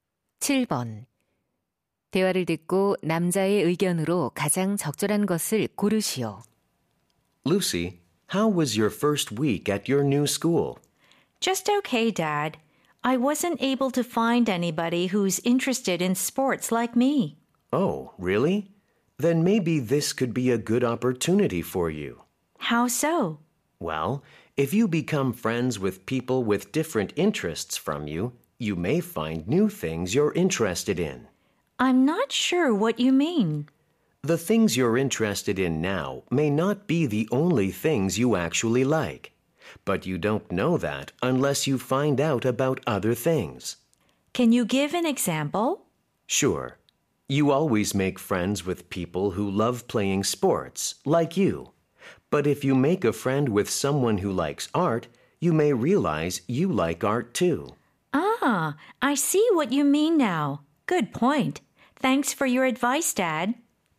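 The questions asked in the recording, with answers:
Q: 대화를 듣고 남자의 의견으로 가장 적절한 것을 고르시오.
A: 관심사가 다른 사람과 친구가 되면 새로운 관심사를 발견할 수 있다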